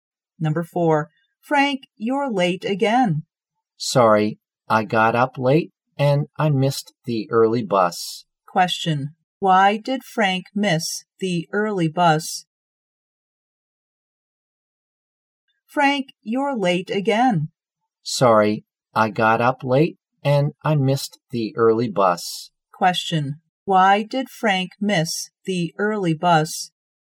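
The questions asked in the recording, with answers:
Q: why did Frank miss the early bus?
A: He got up late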